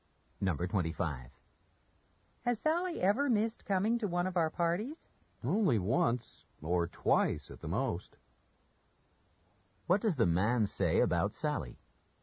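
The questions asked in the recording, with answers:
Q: What does the man say about Sally?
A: She has rarely missed their parties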